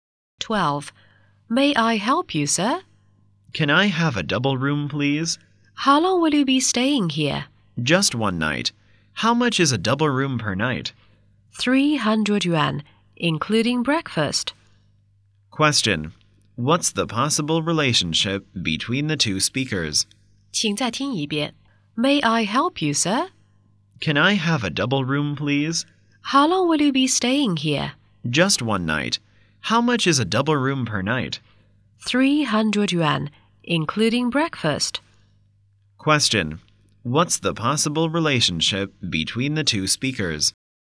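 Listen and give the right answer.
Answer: Hotel receptionist and guest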